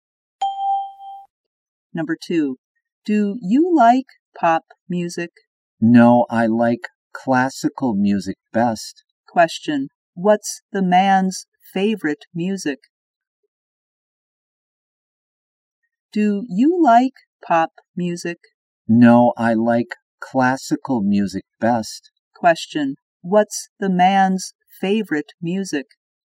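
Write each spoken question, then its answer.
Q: what's the man's favorite music?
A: Classical music.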